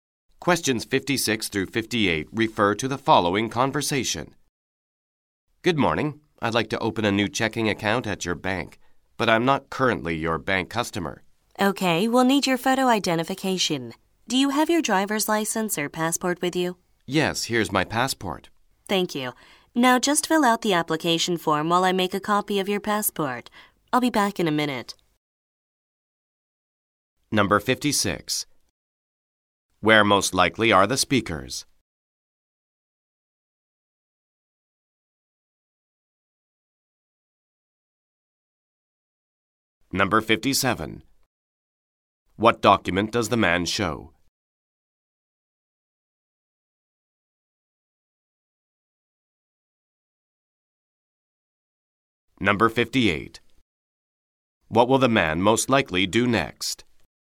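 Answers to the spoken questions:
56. At a bank
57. His passport
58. Fill out an application form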